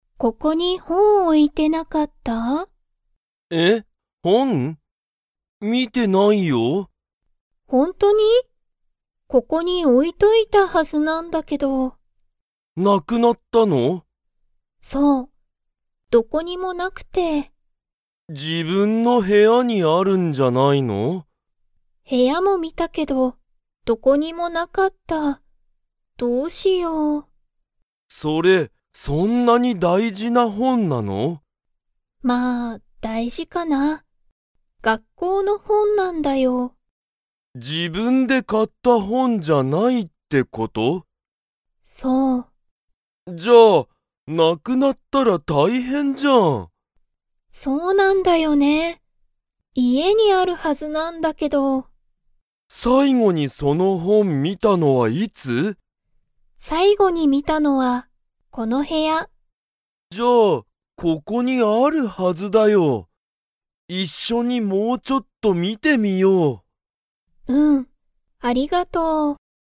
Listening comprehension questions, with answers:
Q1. ケントは、その本ほんを見みましたか?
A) はい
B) いいえ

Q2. その本ほんは____本ほんだ。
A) すごく好すきな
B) 全然大事ぜんぜんだいじじゃない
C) 自分じぶんで買かった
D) 学校がっこうの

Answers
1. B) いいえ
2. D) 学校がっこうの

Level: Level 2

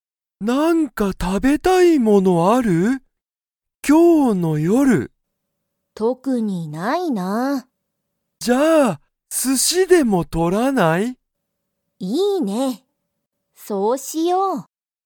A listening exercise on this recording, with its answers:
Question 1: ユウヤとサキは、____お寿司すしを取とる。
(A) 今日きょうの夜よる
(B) 最近さいきんよく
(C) 毎日まいにち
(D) 初はじめて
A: (A) 今日きょうの夜よる

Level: Level 1

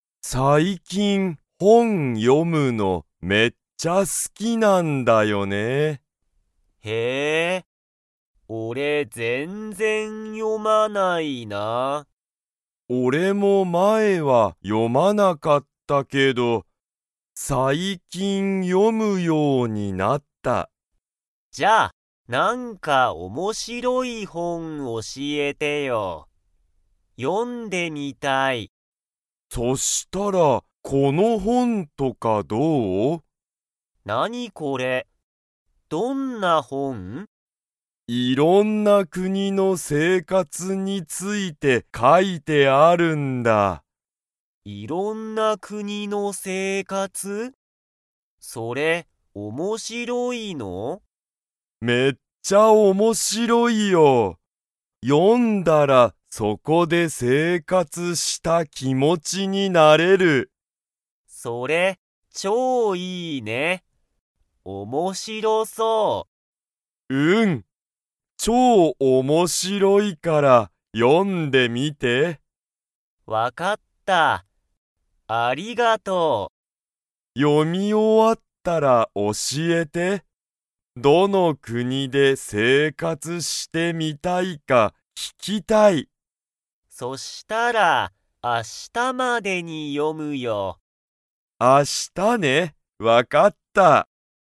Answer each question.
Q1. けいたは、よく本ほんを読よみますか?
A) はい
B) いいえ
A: B) いいえ

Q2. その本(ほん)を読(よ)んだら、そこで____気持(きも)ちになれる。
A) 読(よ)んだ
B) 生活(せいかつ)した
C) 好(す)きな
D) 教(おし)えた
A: B) 生活(せいかつ)した

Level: Level 2

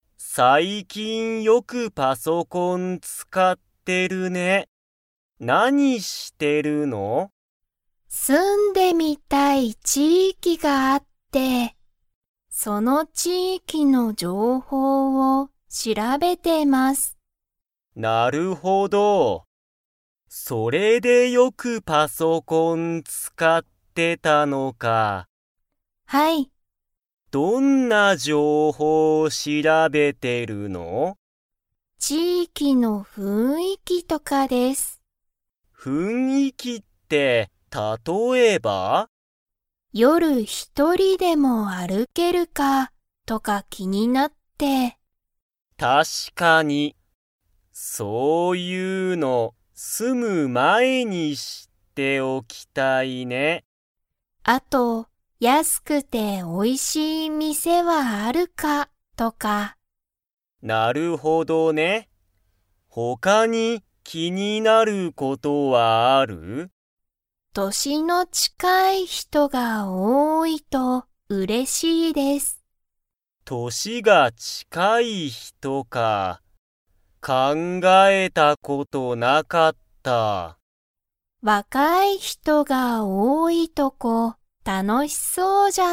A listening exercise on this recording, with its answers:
Comprehension Quiz (Skip if you don't understand the conversation yet)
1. ユウコは、夜よる一人ひとりでも か、気きになっている。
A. 住すめる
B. 歩あるける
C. 食たべれる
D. 買かえる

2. ユウコは、若わかい人ひとが多おおいとこに住すみたいですか?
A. はい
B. いいえ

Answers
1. B. 歩あるける
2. A. はい

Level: Level 3

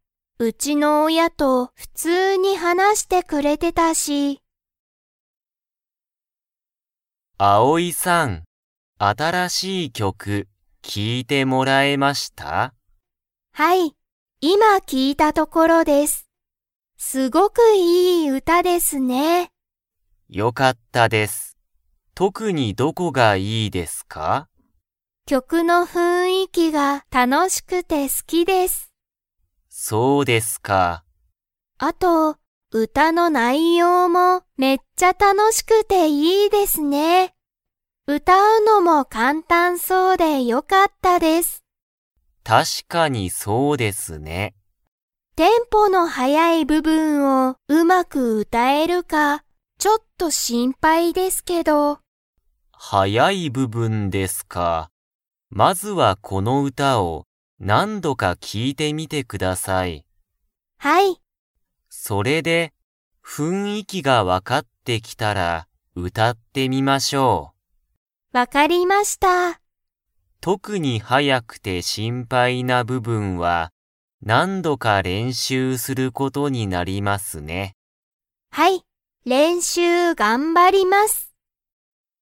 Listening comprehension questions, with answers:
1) アオイは、新あたらしい歌うたが 。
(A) 好すき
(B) 嫌きらい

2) アオイは、まずこの歌うたを、何度なんどか 。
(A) 歌うたってみる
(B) 書かいてみる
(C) 聞きいてみる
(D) 読よんでみる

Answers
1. (A) 好すき
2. (C) 聞きいてみる

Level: Level 3

